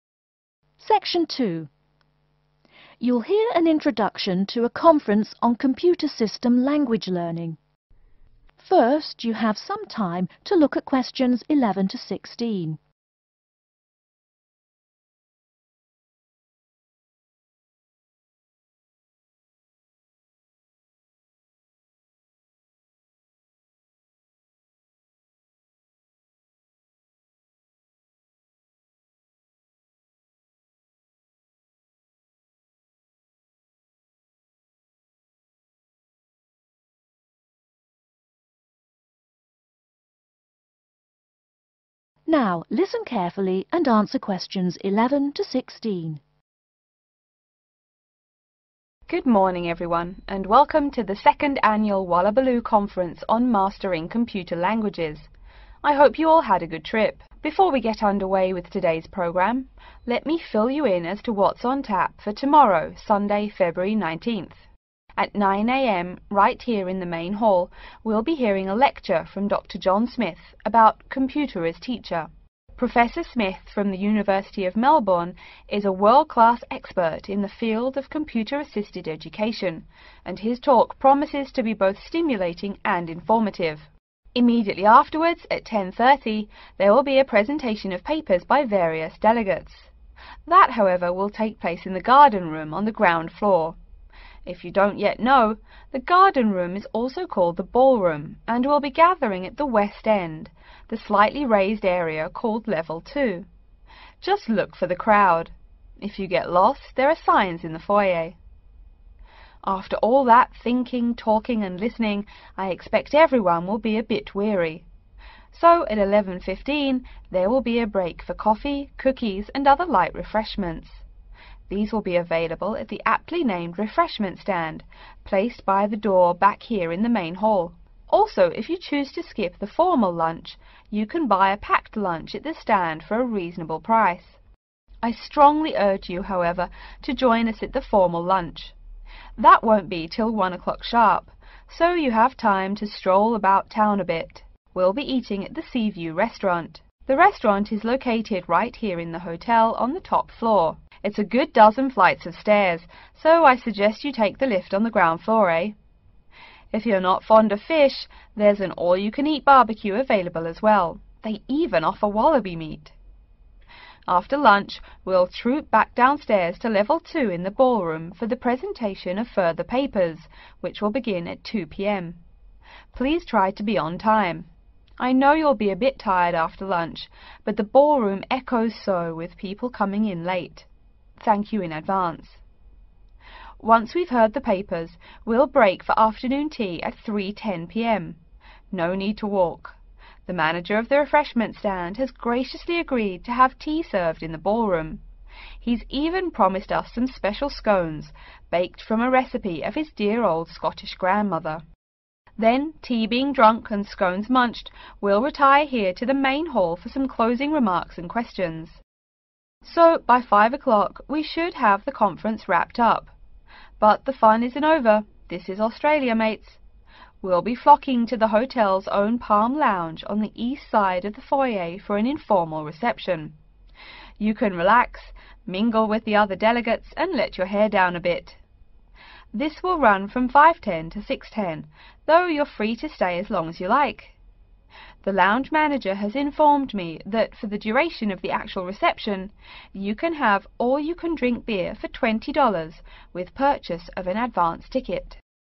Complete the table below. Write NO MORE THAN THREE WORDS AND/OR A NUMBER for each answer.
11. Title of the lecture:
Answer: Computer as Teacher

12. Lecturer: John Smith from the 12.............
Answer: University of Melbourne

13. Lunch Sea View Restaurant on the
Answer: top floor

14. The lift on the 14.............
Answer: ground floor

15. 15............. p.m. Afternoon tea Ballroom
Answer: 3:10

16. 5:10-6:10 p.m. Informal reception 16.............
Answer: Palm Lounge